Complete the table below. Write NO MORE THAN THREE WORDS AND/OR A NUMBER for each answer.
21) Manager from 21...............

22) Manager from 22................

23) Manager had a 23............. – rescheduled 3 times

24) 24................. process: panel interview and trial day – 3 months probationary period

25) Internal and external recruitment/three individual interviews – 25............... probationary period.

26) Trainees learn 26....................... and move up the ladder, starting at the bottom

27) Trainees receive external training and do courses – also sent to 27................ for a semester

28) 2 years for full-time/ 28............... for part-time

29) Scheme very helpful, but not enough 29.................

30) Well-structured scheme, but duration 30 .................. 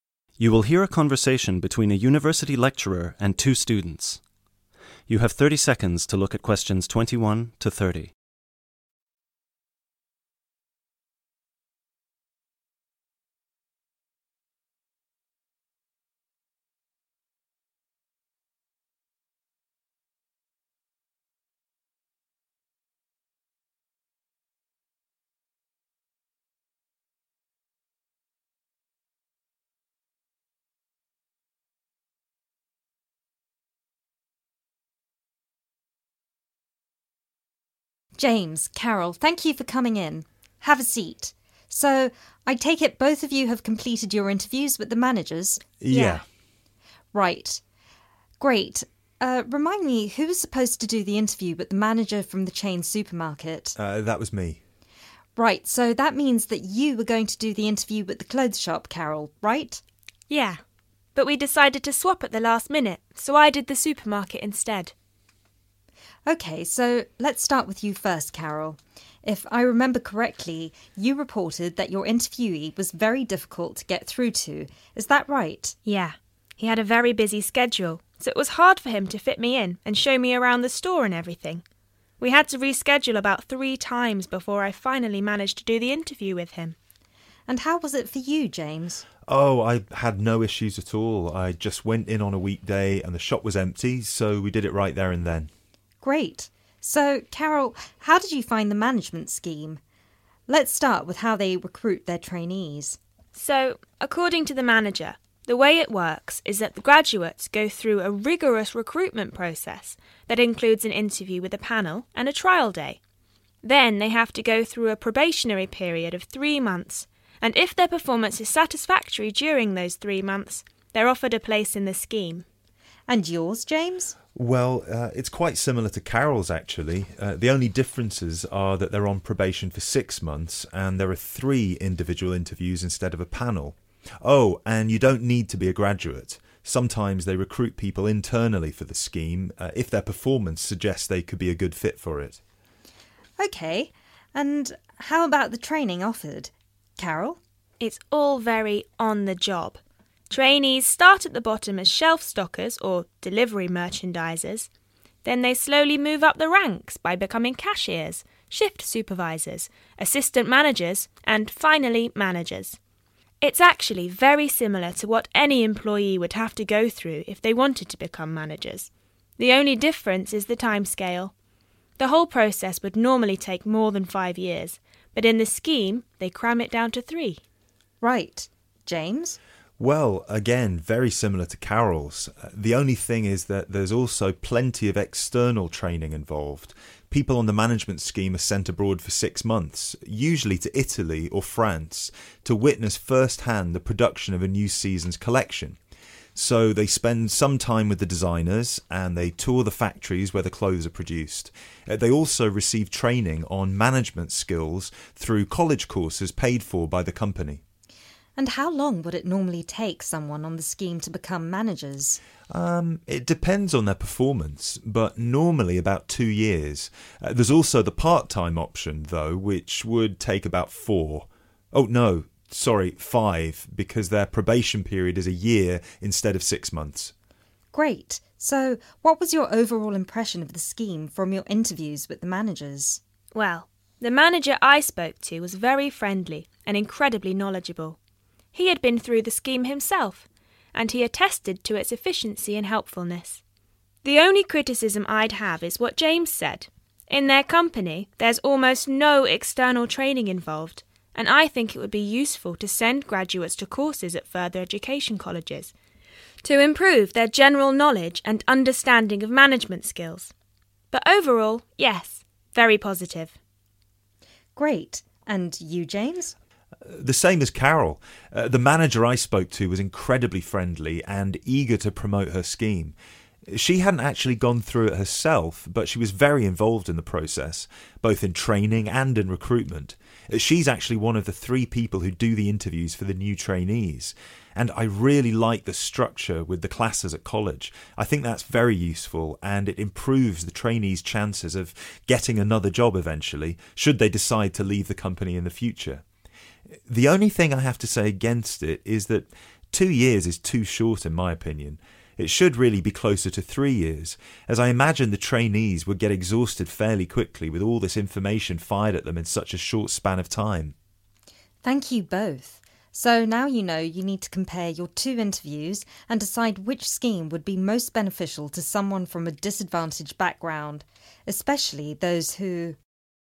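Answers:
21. chain supermarket
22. clothes shop
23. very busy schedule
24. rigorous recruitment
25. 6 months
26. on the job
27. Italy or France
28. 5 years
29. external training
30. too short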